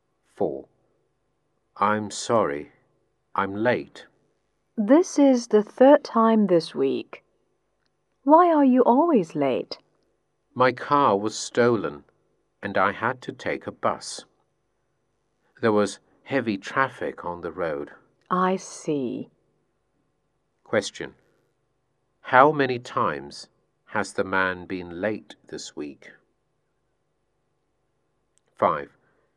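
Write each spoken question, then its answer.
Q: How many times has the man been late this week?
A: Three times.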